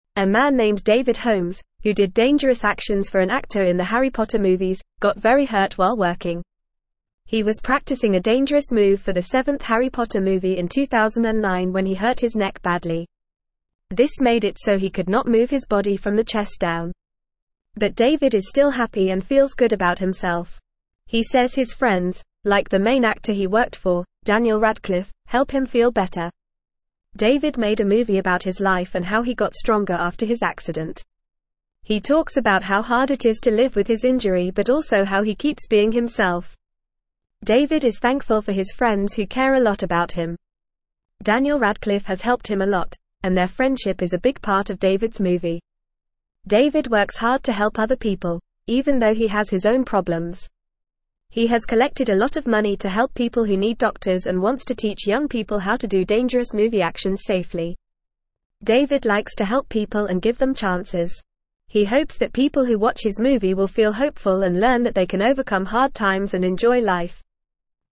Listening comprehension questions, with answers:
Listen and Fill in the Gaps:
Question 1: A man named David Holmes, who did dangerous actions for an (1)______ in the Harry Potter (2)______s, got very hurt while working.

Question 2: A man named David Holmes, who did dangerous actions for an (1)______ in the Harry Potter (2)______s, got very hurt while working.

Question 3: He was practicing a dangerous (3)______ for the seventh Harry Potter movie in 2009 when he hurt his neck badly.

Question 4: But David is still (4)______ and feels good about himself.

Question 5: He says his friends, like the main actor he worked for, Daniel Radcliffe, help him feel (5)______.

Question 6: David (6)______ a movie about his life and how he got stronger after his accident.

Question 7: (7)______ Radcliffe has helped him a lot, and their (8)______ is a big part of David's movie.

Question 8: (7)______ Radcliffe has helped him a lot, and their (8)______ is a big part of David's movie.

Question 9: David (9)______ hard to help other people, even though he has his own problems.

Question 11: He has collected a lot of money to help (10)______ who need doctors and wants to teach (11)______ people how to do dangerous movie actions safely.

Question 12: He hopes that people who watch his movie will feel hopeful and learn that they can overcome hard times and (12)______ life.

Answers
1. actor
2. movie
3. move
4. happy
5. better
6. made
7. Daniel
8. friendship
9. works
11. young
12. enjoy

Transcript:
A man named David Holmes, who did dangerous actions for an actor in the Harry Potter movies, got very hurt while working. He was practicing a dangerous move for the seventh Harry Potter movie in 2009 when he hurt his neck badly. This made it so he could not move his body from the chest down. But David is still happy and feels good about himself. He says his friends, like the main actor he worked for, Daniel Radcliffe, help him feel better.
David made a movie about his life and how he got stronger after his accident. He talks about how hard it is to live with his injury but also how he keeps being himself. David is thankful for his friends who care a lot about him. Daniel Radcliffe has helped him a lot, and their friendship is a big part of David's movie.
David works hard to help other people, even though he has his own problems. He has collected a lot of money to help people who need doctors and wants to teach young people how to do dangerous movie actions safely. David likes to help people and give them chances. He hopes that people who watch his movie will feel hopeful and learn that they can overcome hard times and enjoy life.

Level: Level 2